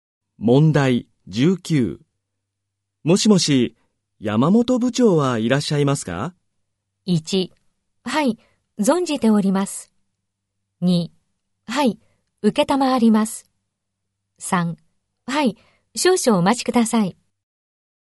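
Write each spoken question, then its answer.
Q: もしもし、山本部長はいらっしゃいますか?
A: 3: はい、少々お待ちください。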